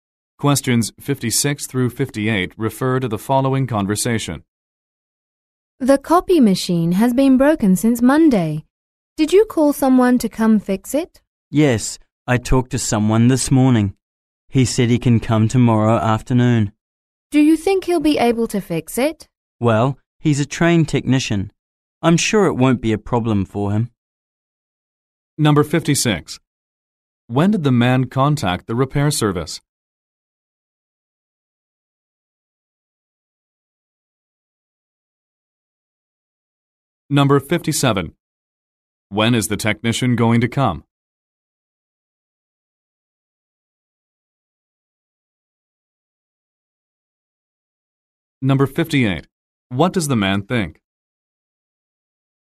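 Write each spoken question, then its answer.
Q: When did the man contact the repair service?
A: This morning

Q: When is the technician going to come?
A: Tomorrow afternoon

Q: What does the man think?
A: The technician will fix it without a problem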